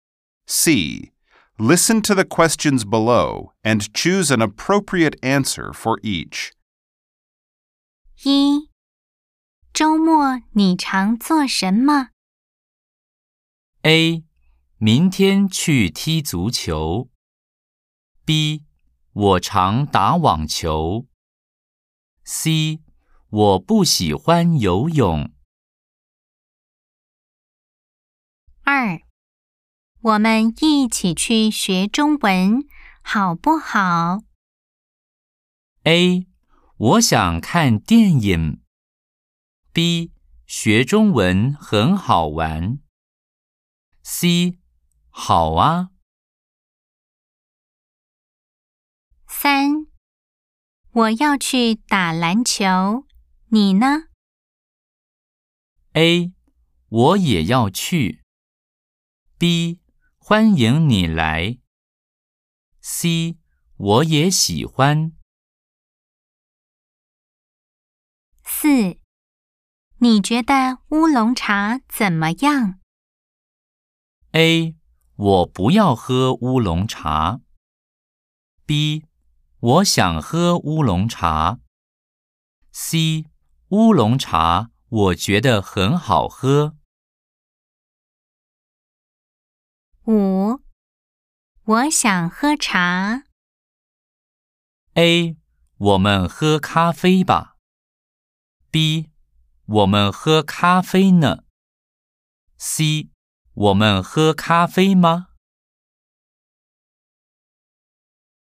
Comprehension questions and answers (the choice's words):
Nghe câu hỏi và chọn câu trả lời thích hợp. 🎧 03-4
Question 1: 週末你常做什麼?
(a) 明天去踢足球。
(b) 我常打网球。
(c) 我不喜欢游泳。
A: 我常打网球。

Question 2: 我們一起去學中文,好不好?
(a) 我想看电影。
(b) 学中文很好玩。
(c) 好啊!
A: 好啊!

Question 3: 我要去打籃球,你呢?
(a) 我也要去。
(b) 欢迎你来。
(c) 我也喜欢。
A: 我也要去。

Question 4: 你覺得烏龍茶怎麼樣?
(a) 我不要喝乌龙茶。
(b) 我想喝乌龙茶。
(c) 乌龙茶,我觉得很好喝。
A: 乌龙茶,我觉得很好喝。

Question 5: 我想喝茶。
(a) 我们喝咖啡吧!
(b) 我们喝咖啡呢!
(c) 我们喝咖啡吗?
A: 我们喝咖啡吧!